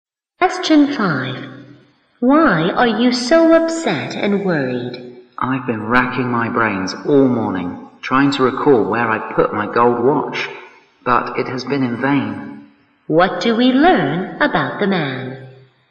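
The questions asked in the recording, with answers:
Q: What do we learn about the man?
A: He can't remember where he put his gold watch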